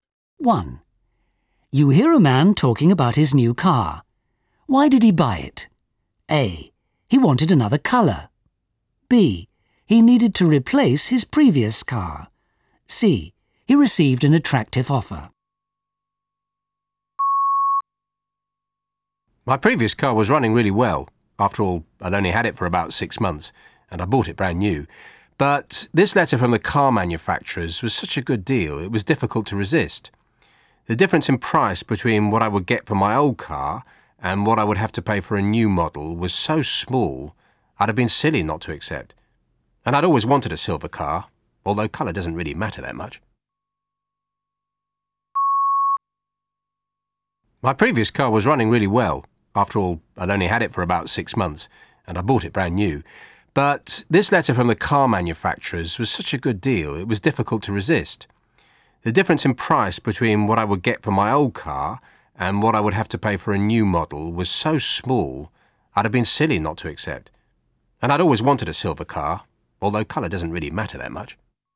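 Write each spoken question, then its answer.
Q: Why did he buy it? A. He wanted another colour. B. He needed to replace his previous car. C. He received an attractive offer.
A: C: He received an attractive offer.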